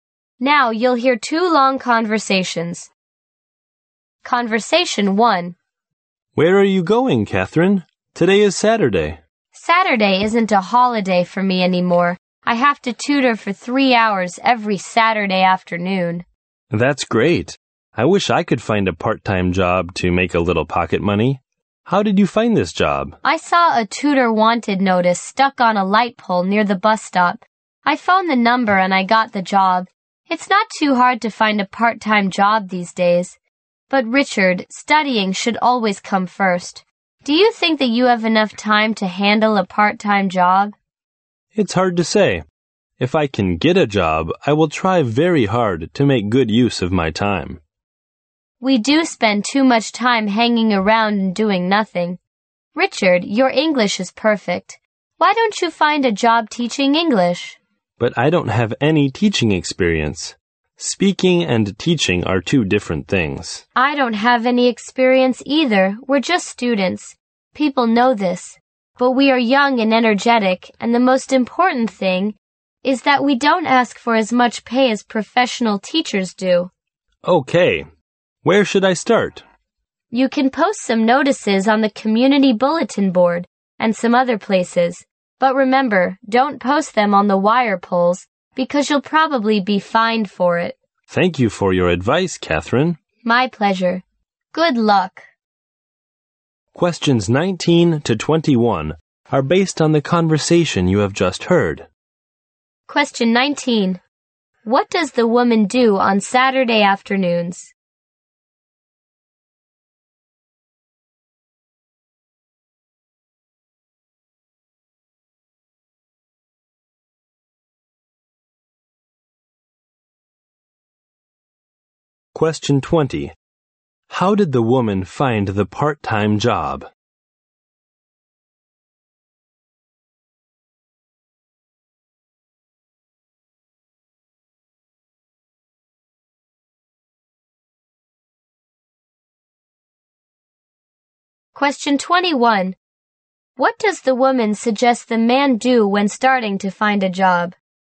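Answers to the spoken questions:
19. She tutors for three hours
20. She saw a notice on a light pole near the bus stop and phoned
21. Post notices on the community bulletin board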